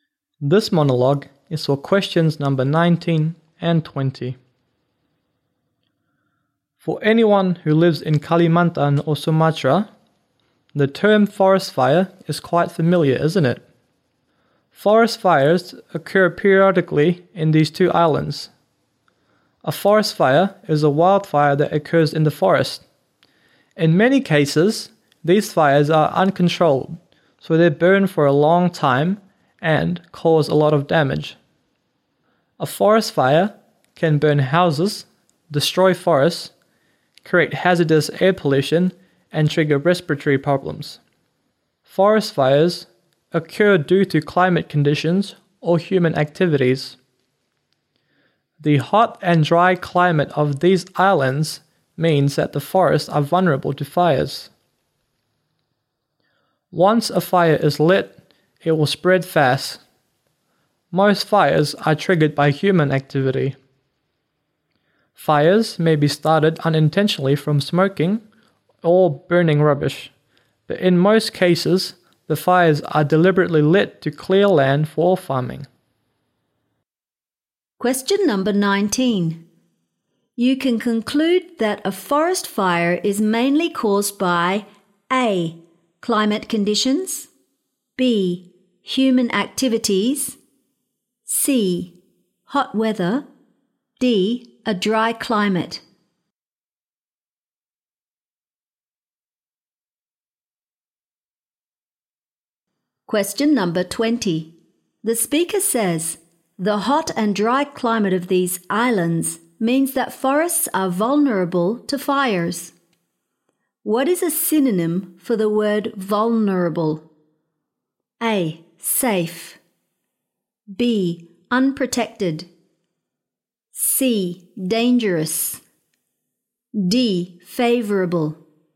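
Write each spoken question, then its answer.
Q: You can conclude that a forest fire is mainly caused by A.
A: B: Human activities

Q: What is a synonym for the word vulnerable?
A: B: Unprotected.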